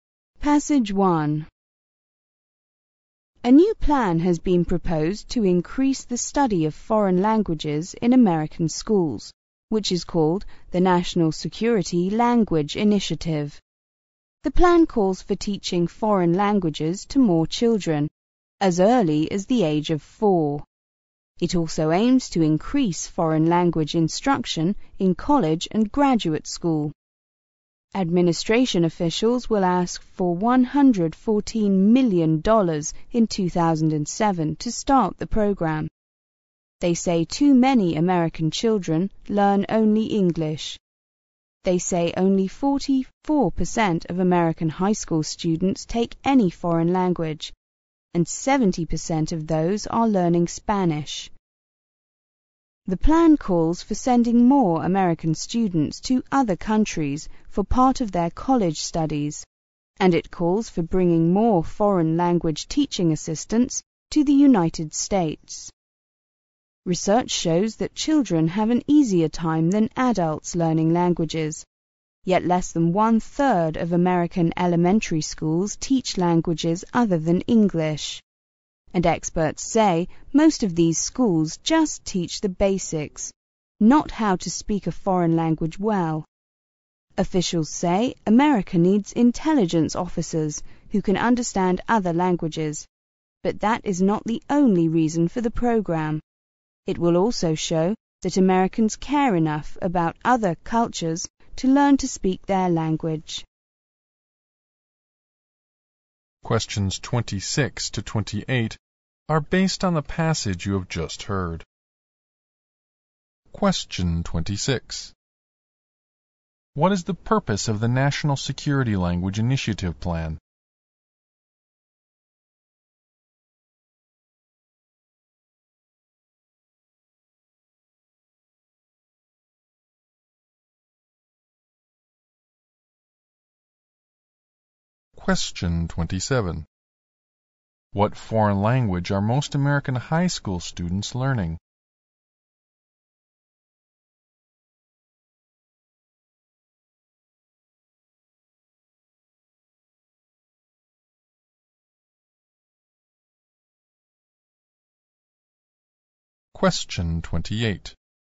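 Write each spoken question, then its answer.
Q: What is the purpose of the National Security Language Initiative Plan?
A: To increase the study of foreign languages in American schools

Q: What foreign language are most American high school students learning?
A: Spanish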